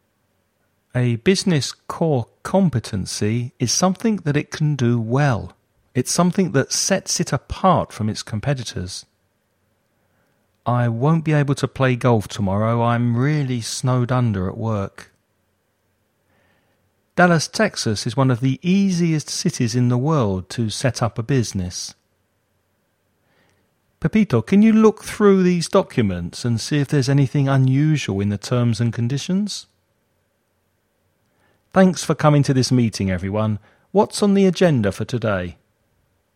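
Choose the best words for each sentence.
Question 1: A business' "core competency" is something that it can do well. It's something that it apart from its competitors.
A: sets

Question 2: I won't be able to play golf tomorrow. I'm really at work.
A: snowed under

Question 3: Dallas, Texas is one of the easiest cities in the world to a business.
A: set up

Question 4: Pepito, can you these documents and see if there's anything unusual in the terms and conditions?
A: look through

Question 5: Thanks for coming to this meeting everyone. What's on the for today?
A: agenda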